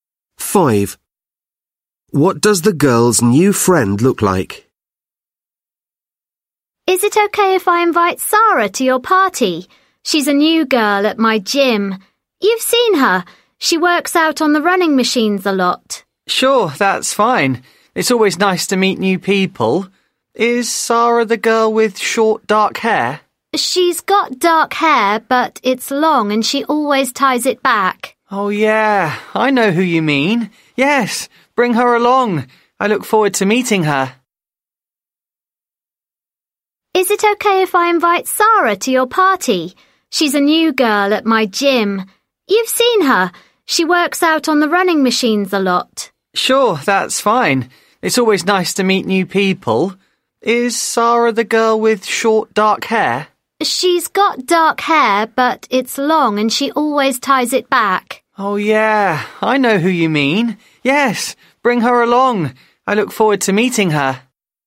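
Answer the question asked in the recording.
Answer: long dark hair tied back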